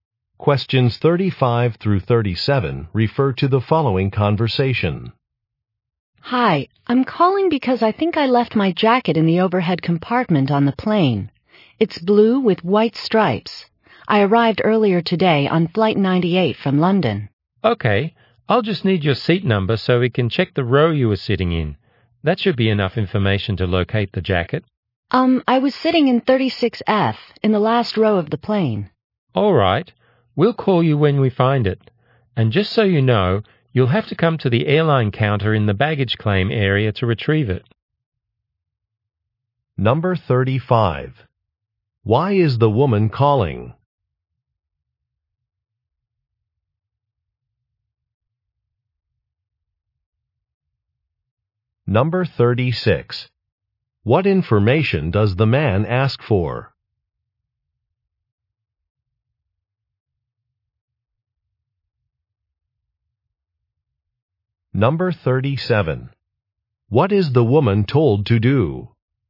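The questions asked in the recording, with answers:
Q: Why is the woman calling?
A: She left her jacket on the plane

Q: What information does the man ask for?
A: Her seat number

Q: What is the woman told to do?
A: Come to the airline counter in the baggage claim area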